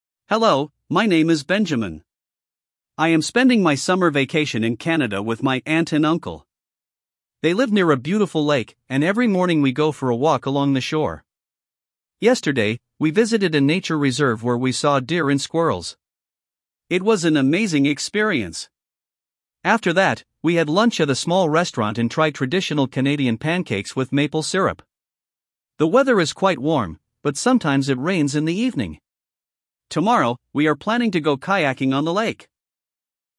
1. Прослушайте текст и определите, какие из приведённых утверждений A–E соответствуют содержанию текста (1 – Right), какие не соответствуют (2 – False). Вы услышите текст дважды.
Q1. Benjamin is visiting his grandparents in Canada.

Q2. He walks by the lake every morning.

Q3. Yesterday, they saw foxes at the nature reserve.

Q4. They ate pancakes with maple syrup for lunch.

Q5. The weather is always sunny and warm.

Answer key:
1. False
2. Right
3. False
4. Right
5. False

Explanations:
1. He is visiting his aunt and uncle, not grandparents.
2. He walks by the lake every morning.
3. They saw deer and squirrels, not foxes.
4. They ate pancakes with maple syrup.
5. The weather is warm but sometimes rainy in the evening.

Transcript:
Hello, my name is Benjamin. I am spending my summer vacation in Canada with my aunt and uncle. They live near a beautiful lake, and every morning we go for a walk along the shore. Yesterday, we visited a nature reserve where we saw deer and squirrels. It was an amazing experience! After that, we had lunch at a small restaurant and tried traditional Canadian pancakes with maple syrup. The weather is quite warm, but sometimes it rains in the evening. Tomorrow, we are planning to go kayaking on the lake!

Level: 6 класс